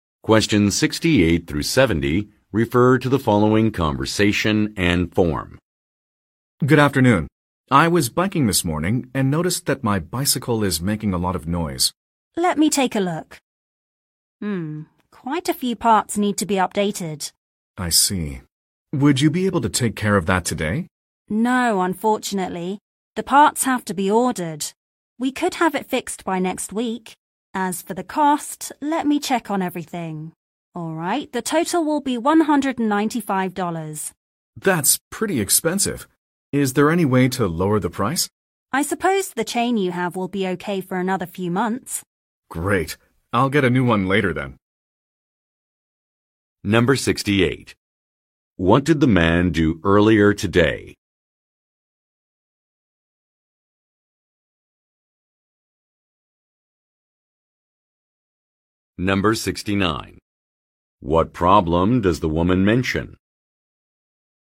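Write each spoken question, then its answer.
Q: What did the man do earlier today?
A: He rode his bicycle.

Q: What problem does the woman mention?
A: The parts have to be ordered, so the bike can't be fixed today.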